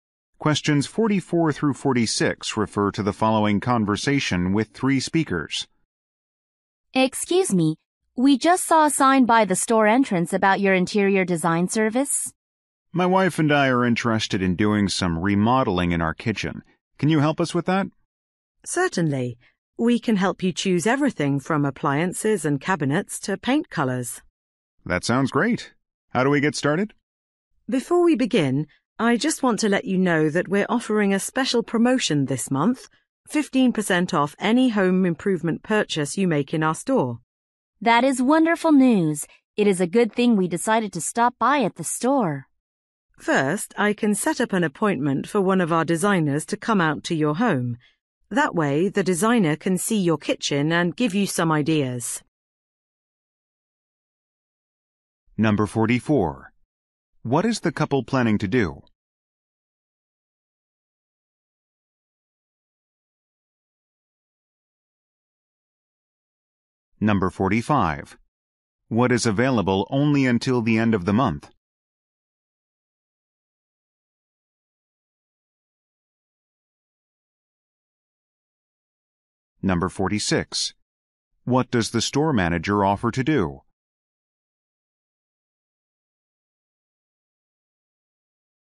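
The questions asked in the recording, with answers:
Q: What is the couple planning to do?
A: Remodel their kitchen

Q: What is available only until the end of the month?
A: 15% off any home improvement purchase

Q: What does the store manager offer to do?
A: Set up an appointment for a designer to visit their home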